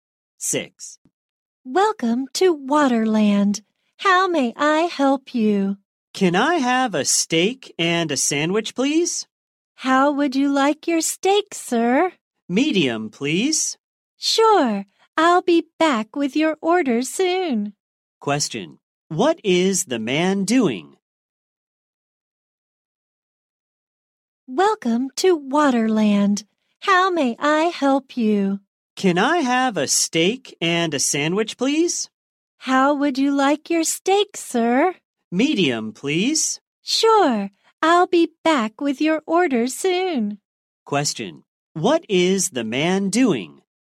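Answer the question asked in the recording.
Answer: Ordering food in a restaurant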